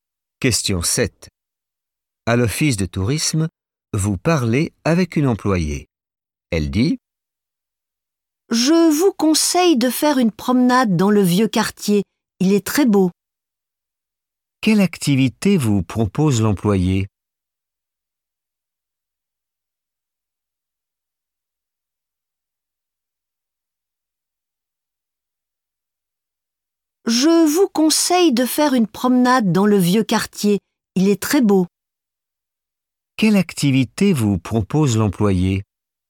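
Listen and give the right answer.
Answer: une promenade dans le vieux quartier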